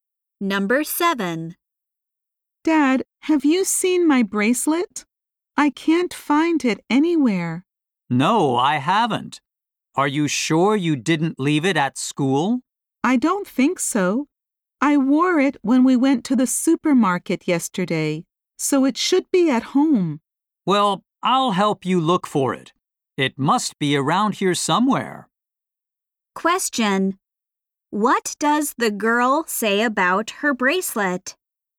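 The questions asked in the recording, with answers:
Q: What does the girl say about her bracelet?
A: She wore it yesterday, so it should be at home.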